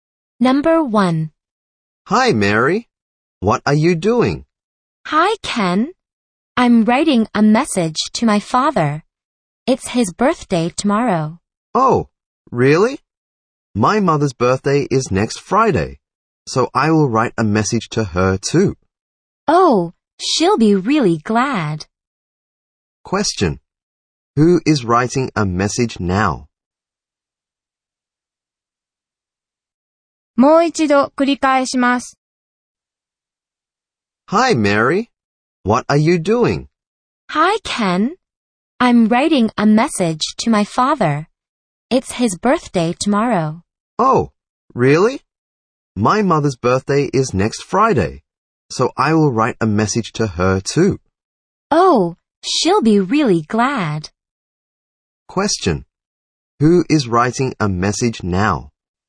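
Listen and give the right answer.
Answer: Mary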